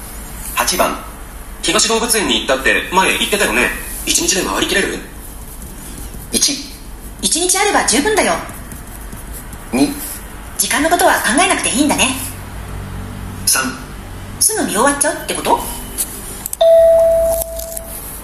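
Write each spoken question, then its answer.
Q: 東動物園に行ったって前言ってたよね、一日で回りきれる。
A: 1: 1日あれば十分だよ。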